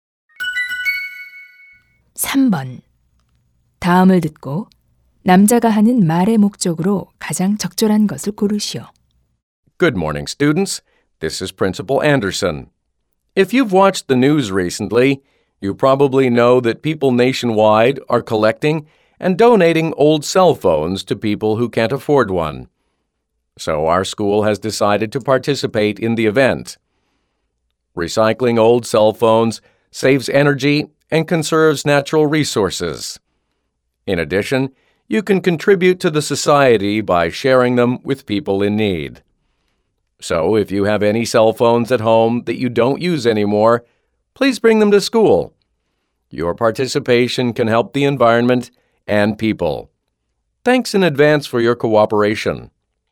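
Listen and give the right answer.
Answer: 학생들에게 안 쓰는 휴대전화를 학교로 가져와 기부하도록 요청하려고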